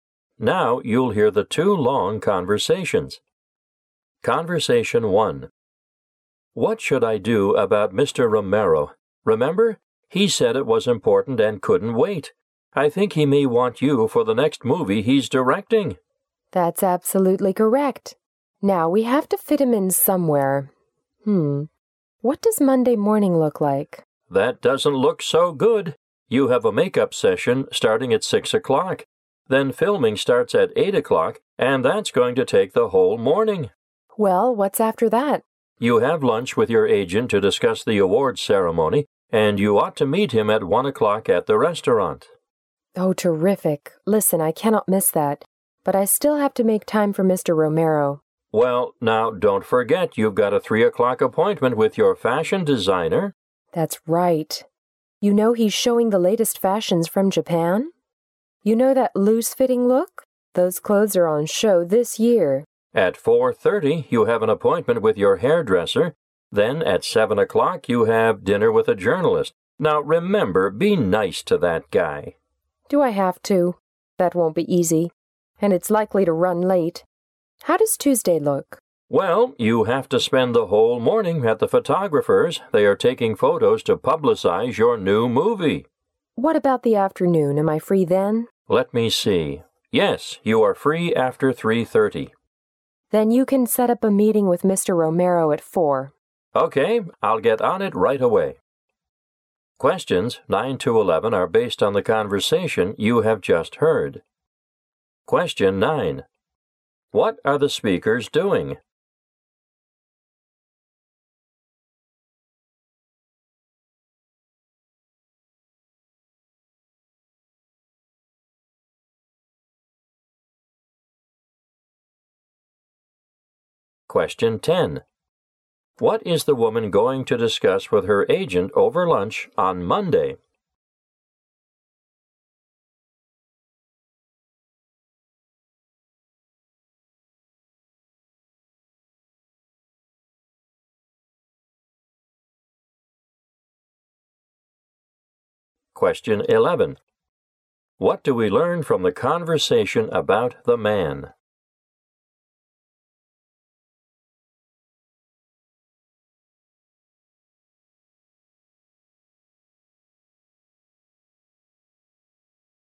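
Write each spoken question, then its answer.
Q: What are the speakers doing?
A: Planning the woman's schedule

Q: What is the woman going to discuss with her agent over lunch on Monday?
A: The awards ceremony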